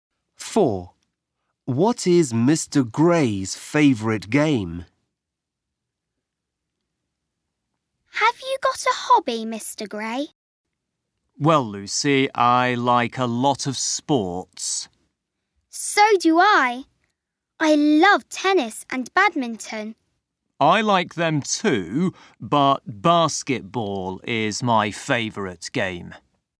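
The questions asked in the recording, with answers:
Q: What is Mr. Gray's favourite game?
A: Basketball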